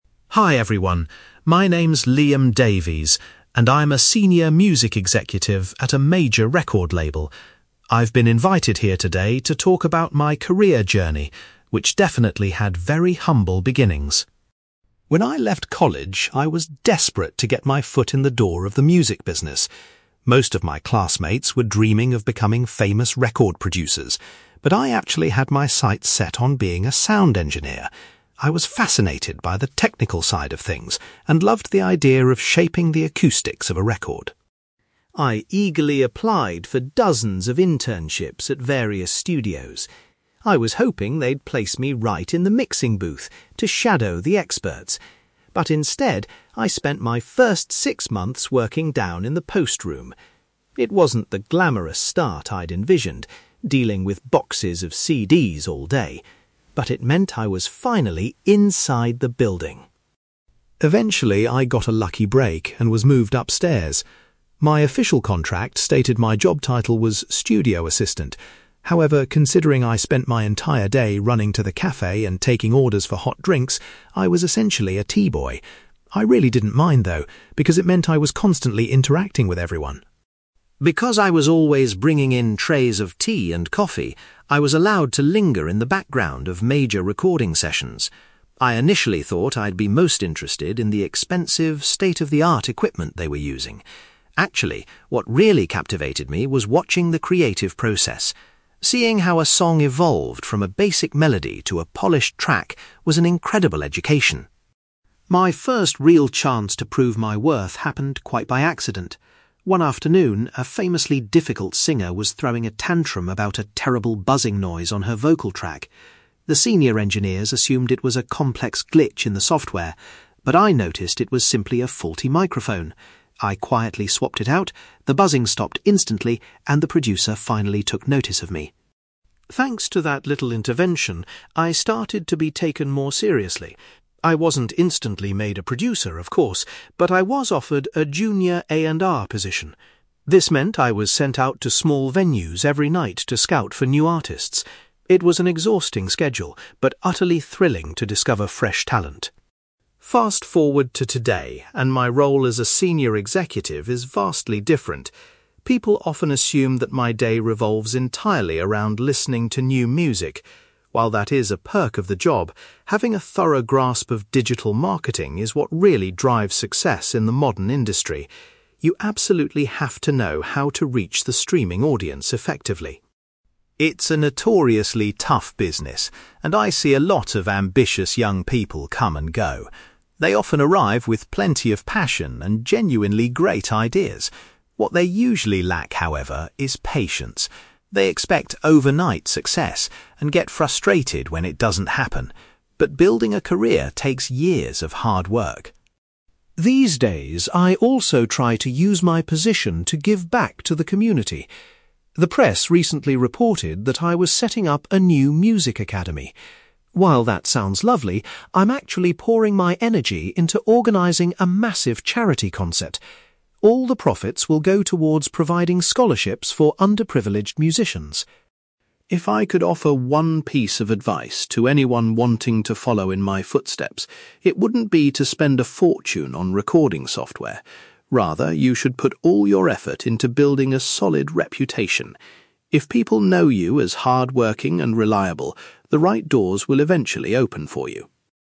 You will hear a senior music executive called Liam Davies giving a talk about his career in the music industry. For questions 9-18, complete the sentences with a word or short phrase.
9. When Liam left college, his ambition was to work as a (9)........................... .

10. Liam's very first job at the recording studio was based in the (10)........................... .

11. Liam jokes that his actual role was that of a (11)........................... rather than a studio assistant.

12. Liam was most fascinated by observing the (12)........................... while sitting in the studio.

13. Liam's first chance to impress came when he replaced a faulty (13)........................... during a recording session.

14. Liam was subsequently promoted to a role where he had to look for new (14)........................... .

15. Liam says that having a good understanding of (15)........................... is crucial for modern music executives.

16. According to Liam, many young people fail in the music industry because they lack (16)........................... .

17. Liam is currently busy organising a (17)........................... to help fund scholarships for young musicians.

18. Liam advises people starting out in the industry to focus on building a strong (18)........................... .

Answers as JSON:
{"9": "sound engineer", "10": "post room", "11": "teaboy", "12": "creative process", "13": "microphone", "14": "artists", "15": "digital marketing", "16": "patience", "17": "charity concert", "18": "reputation"}

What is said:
Liam Davies: Hi everyone. My name's Liam Davies, and I'm a senior music executive at a major record label. I've been invited here today to talk about my career journey, which definitely had very humble beginnings!
When I left college, I was desperate to get my foot in the door of the music business. Most of my classmates were dreaming of becoming famous record producers, but I actually had my sights set on being a sound engineer. I was fascinated by the technical side of things and loved the idea of shaping the acoustics of a record.
I eagerly applied for dozens of internships at various studios. I was hoping they'd place me right in the mixing booth to shadow the experts, but instead, I spent my first six months working down in the post room. It wasn't the glamorous start I'd envisioned, dealing with boxes of CDs all day, but it meant I was finally inside the building!
Eventually, I got a lucky break and was moved upstairs. My official contract stated my job title was 'studio assistant'. However, considering I spent my entire day running to the café and taking orders for hot drinks, I was essentially a teaboy. I really didn't mind, though, because it meant I was constantly interacting with everyone.
Because I was always bringing in trays of tea and coffee, I was allowed to linger in the background of major recording sessions. I initially thought I'd be most interested in the expensive, state-of-the-art equipment they were using. Actually, what really captivated me was watching the creative process. Seeing how a song evolved from a basic melody to a polished track was an incredible education.
My first real chance to prove my worth happened quite by accident. One afternoon, a famously difficult singer was throwing a tantrum about a terrible buzzing noise on her vocal track. The senior engineers assumed it was a complex glitch in the software. But I noticed it was simply a faulty microphone. I quietly swapped it out, the buzzing stopped instantly, and the producer finally took notice of me.
Thanks to that little intervention, I started to be taken more seriously. I wasn't instantly made a producer, of course, but I was offered a junior A&R position. This meant I was sent out to small venues every night to scout for new artists. It was an exhausting schedule, but utterly thrilling to discover fresh talent.
Fast forward to today, and my role as a senior executive is vastly different. People often assume that my day revolves entirely around listening to new music. While that is a perk of the job, having a thorough grasp of digital marketing is what really drives success in the modern industry. You absolutely have to know how to reach the streaming audience effectively.
It's a notoriously tough business, and I see a lot of ambitious young people come and go. They often arrive with plenty of passion and genuinely great ideas. What they usually lack, however, is patience. They expect overnight success and get frustrated when it doesn't happen, but building a career takes years of hard work.
These days, I also try to use my position to give back to the community. The press recently reported that I was setting up a new music academy. While that sounds lovely, I'm actually pouring my energy into organising a massive charity concert. All the profits will go towards providing scholarships for underprivileged musicians.
If I could offer one piece of advice to anyone wanting to follow in my footsteps, it wouldn't be to spend a fortune on recording software. Rather, you should put all your effort into building a solid reputation. If people know you as hardworking and reliable, the right doors will eventually open for you.

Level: B2